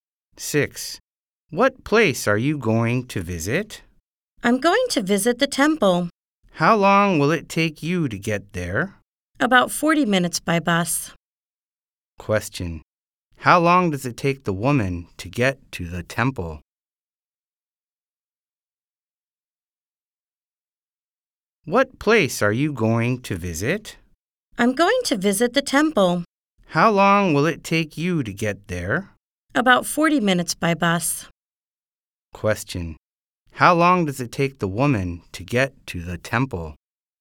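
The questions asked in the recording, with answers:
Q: How long does it take the woman to get to the temple?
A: About 40 minutes by bus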